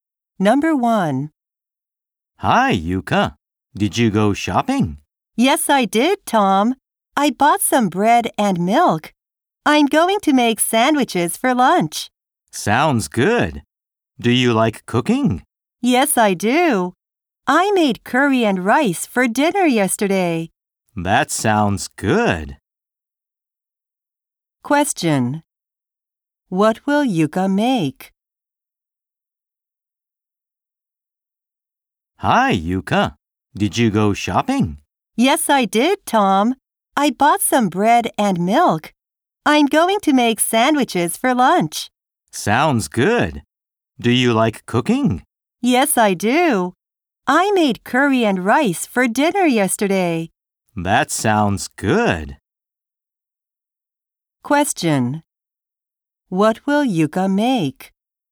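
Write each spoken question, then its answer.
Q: Question. What will Yuka make?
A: Sandwiches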